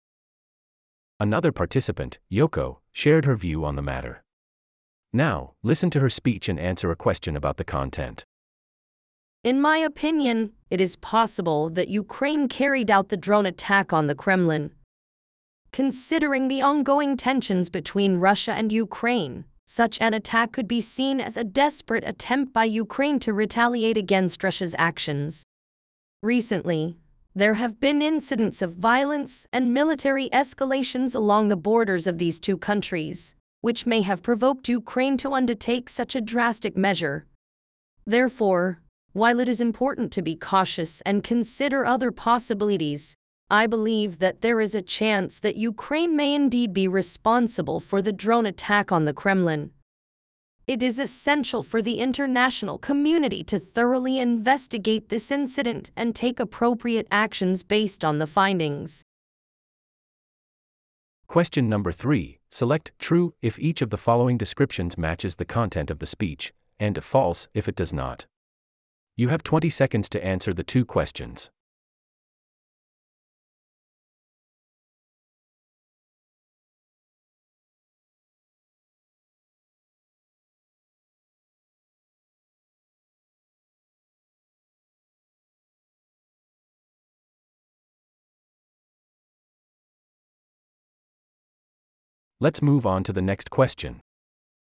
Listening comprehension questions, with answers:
Question : True or False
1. She believes that it is highly unlikely that Ukraine carried out the drone attack on the Kremlin.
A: False

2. She mentions incidents of violence and military escalations between Russia and Ukraine as a reason behind the attack.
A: True

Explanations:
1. In my opinion, it is possible that Ukraine carried out the drone attack on the Kremlin.

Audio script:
Another participant Yoko shared her view on the matter. Now, listen to her speech and answer a question about the content.
In my opinion, it is possible that Ukraine carried out the drone attack on the Kremlin.
Considering the ongoing tensions between Russia and Ukraine, such an attack could be seen as a desperate attempt by Ukraine to retaliate against Russia's actions.
Recently, there have been incidents of violence and military escalations along the borders of these two countries, which may have provoked Ukraine to undertake such a drastic measure.
Therefore, while it is important to be cautious and consider other possibilities, I believe that there is a chance that Ukraine may indeed be responsible for the drone attack on the Kremlin.
It is essential for the international community to thoroughly investigate this incident and take appropriate actions based on the findings.
3: Select 'True' if each of the following descriptions matches the content of the speech, and 'False' if it does not. You have 20 seconds to answer the two questions.
Let's move on to the next question.